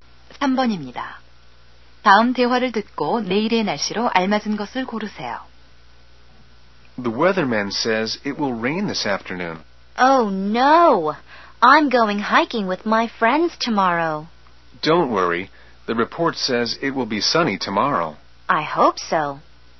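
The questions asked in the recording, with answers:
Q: 다음 대화를 듣고 내일의 날씨로 알맞은 것을 고르세요.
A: 맑음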